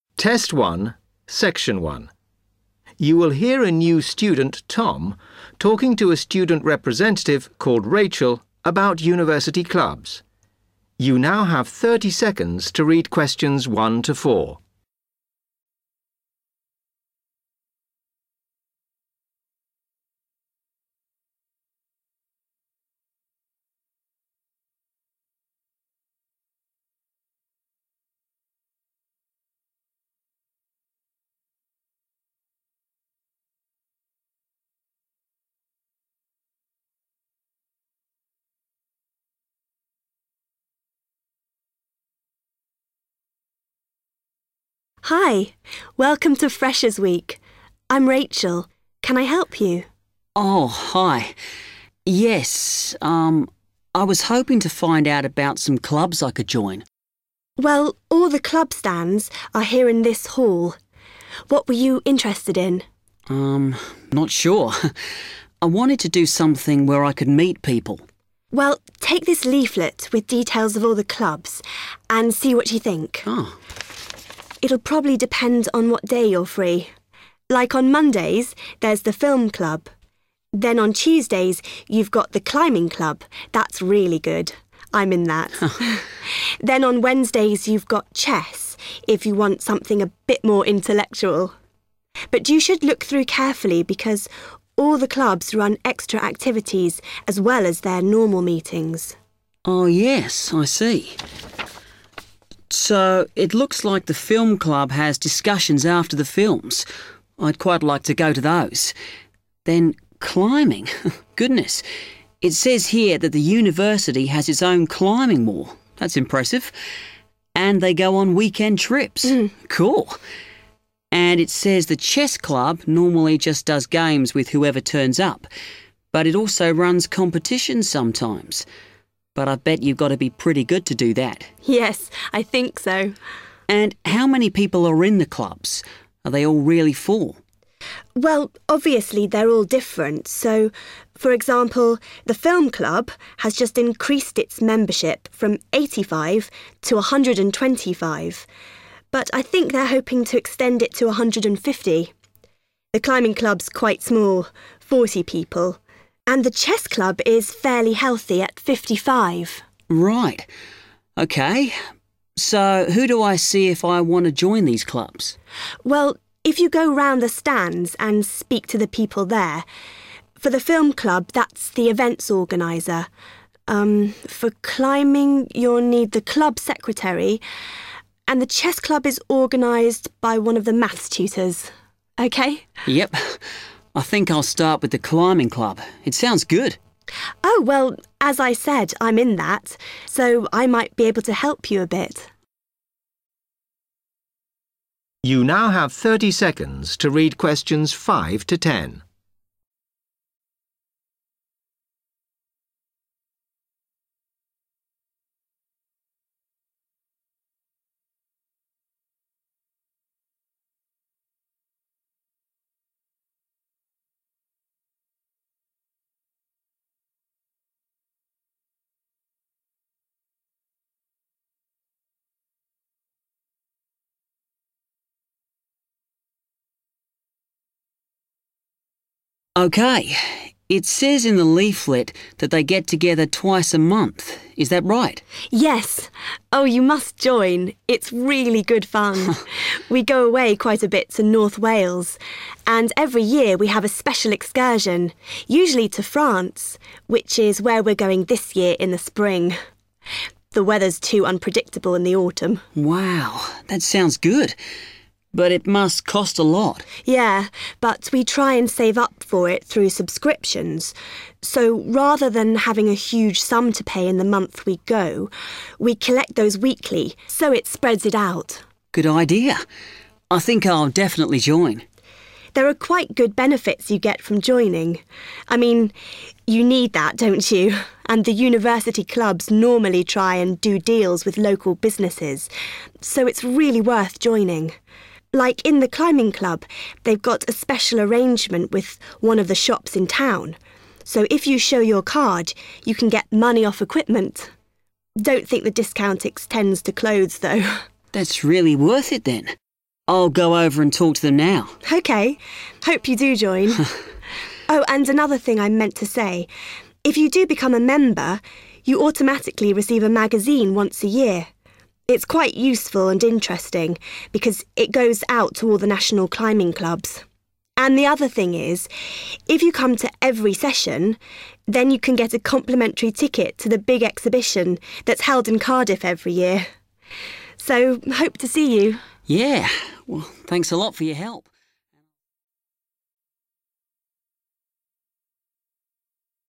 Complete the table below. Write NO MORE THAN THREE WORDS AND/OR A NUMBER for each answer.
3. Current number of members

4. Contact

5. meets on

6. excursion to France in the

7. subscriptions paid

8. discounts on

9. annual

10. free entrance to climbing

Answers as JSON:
{"3": "125", "4": "the club secretary / club secretary", "5": "Tuesdays", "6": "spring", "7": "weekly", "8": "equipment", "9": "magazine", "10": "exhibition"}

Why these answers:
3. The correct answer is 125 because Rachel explains the current size of the film club. She mentions that the club used to have 85 members, but it recently increased its membership to 125 (and hopes to reach 150 in the future). Therefore, the current number of members is 125.
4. The correct answer is confirmed when Rachel explains whom to contact to join each club. For the climbing club on Tuesdays, she explicitly mentions that Tom needs to speak to the "club secretary".
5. The correct answer is "Tuesdays" because the note asks for the day the climbing club "meets on". In the conversation, Rachel tells Tom, "on Tuesdays you've got the climbing club," which directly shows that Tuesday is the day the club meets.
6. The correct answer is "spring" because Rachel mentions that the climbing club takes a special trip to France every year, and this year they are traveling during the spring. Pay attention to keywords like "special excursion", "France", and "in the spring".
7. The correct answer is "weekly" because Rachel explains how the climbing club members pay for their trips. When Tom mentions that trips must be expensive, Rachel clarifies that they save money through subscriptions and "collect those weekly" so that members do not have to pay a large sum all at once.
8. The correct answer is "equipment" because Rachel explains that climbing club members can get "money off equipment" at a local shop. The phrase "money off" is a synonym for "discount".
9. The correct answer is magazine because Rachel lists the benefits of joining the climbing club and mentions that members "automatically receive a magazine once a year". In the notes, "annual" means happening "once a year".
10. The correct answer is "exhibition" because Rachel mentions that members who attend every session receive a "complimentary ticket" (which means "free entrance") to a large exhibition located in Cardiff.

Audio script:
Rachel: Hi, welcome to Freshers Week. I'm Rachel. Can I help you?
Tom: Oh, hi - yes. Erm - I was hoping to find out about some clubs I could join.
Rachel: Well, all the club stands are here in this hall. What were you interested in?
Tom: Um - not sure. I wanted to do something where I could meet people.
Rachel: Well, take this leaflet with details of all the clubs and see what you think. It'll probably depend on what day you're free. Like on Mondays there's the film club, then on Tuesdays you've got the climbing club - that's really good, I'm in that - then on Wednesdays you've got chess, if you want something a bit more intellectual! But you should look through carefully because all the clubs run extra activities as well as their normal meetings.
Tom: Oh, yes I see. [as if reading] So it looks like the film club has discussions after the films - I'd quite like to go to those. Then climbing - goodness, it says here that the University has its own climbing wall - that's impressive - and they go on weekend trips. Cool. And it says the chess club normally just does games with whoever turns up but it also runs competitions sometimes. But I bet you've got to be pretty good to do that.
Rachel: Yes, I think so!
Tom: And how many people are in the clubs? Are they all really full?
Rachel: Well, obviously they're all different so, for example, the film club has just increased its membership from eighty five to a hundred and twenty five but I think they're hoping to extend it to a hundred and fifty. The climbing club's quite small - forty people - and the chess club is fairly healthy at fifty five.
Tom: Right. OK, so who do I see if I want to join these clubs?
Rachel: Well, if you go round the stands and speak to the people there. For the film club that's the events organiser - um, for climbing you'll need the club secretary and the chess club is organised by one of the Maths tutors. OK?
Tom: Yup. I think I'll start with the climbing club - it sounds good.
Rachel: Yes. Oh, you must join. It's really good fun. We go away quite a bit to North Wales and every year we have a special excursion, usually to France, which is where we're going this year in the spring. The weather's too unpredictable in the autumn.
Tom: Wow! That sounds good - but it must cost a lot.
Rachel: Yeah, but we try and save up for it through subscriptions so rather than having a huge sum to pay in the month we go we collect those weekly so it spreads it out.
Tom: Good idea. I think I'll definitely join.
Rachel: There are quite good benefits you get from joining. I mean, you need that don't you? And the University clubs normally try and do deals with local businesses, so it's really worth joining. Like in the climbing club they've got a special arrangement with one of the shops in town so if you show your card you can get money off equipment. Don't think the discount extends to clothes though.
Tom: That's really worth it then. I'll go over and talk to them now.
Rachel: OK. Hope you do join. Oh, and another thing I meant to say. If you do become a member, you automatically receive a magazine once a year. It's quite useful and interesting because it goes out to all the national climbing clubs. And the other thing is, if you come to every session, then you can get a complimentary ticket to the big exhibition that's held in Cardiff every year. So - hope to see you ...